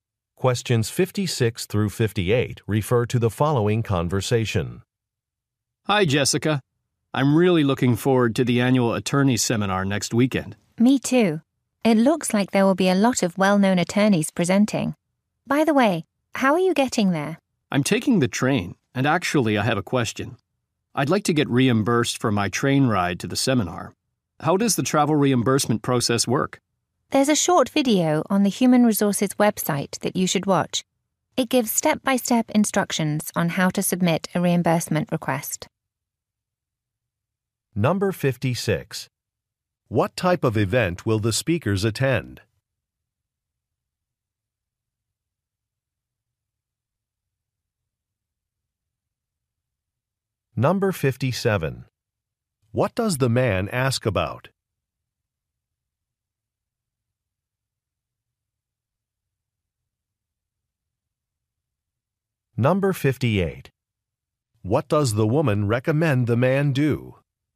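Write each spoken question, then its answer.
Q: What type of event will the speakers attend?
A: An attorney seminar

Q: What does the man ask about?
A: The travel reimbursement process

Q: What does the woman recommend the man do?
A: Watch a video on the HR website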